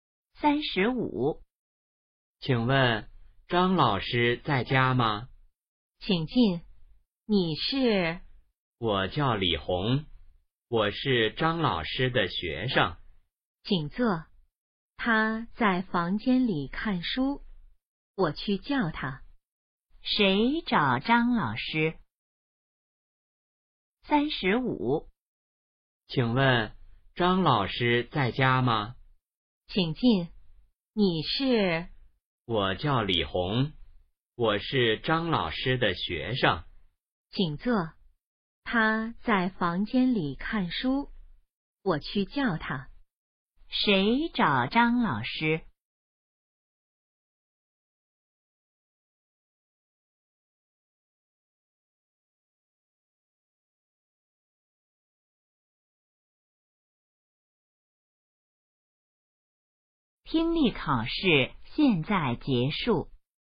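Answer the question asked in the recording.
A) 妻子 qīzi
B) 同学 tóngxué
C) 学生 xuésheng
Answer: C) 学生 xuésheng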